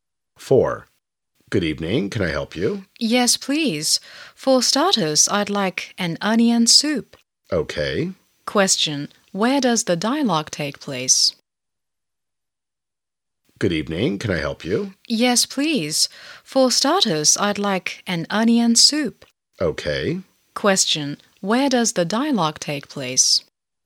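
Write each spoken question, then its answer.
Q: Where does the dialogue take place?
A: In a restaurant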